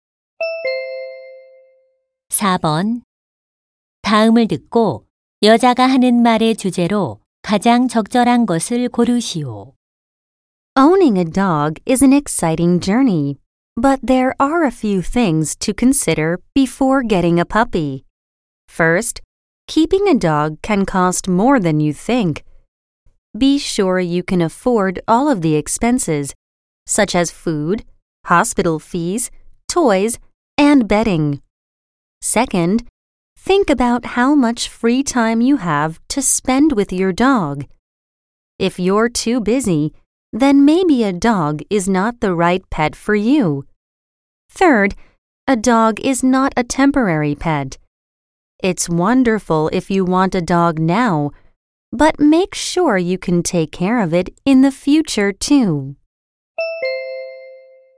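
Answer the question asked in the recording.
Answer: 개를 키우기 전에 고려해야 할 사항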